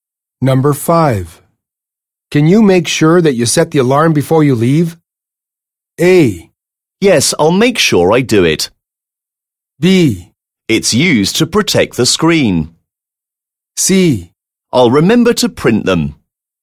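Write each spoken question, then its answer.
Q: Can you make sure that you set the alarm before you leave?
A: A: Yes, I'll make sure I do it.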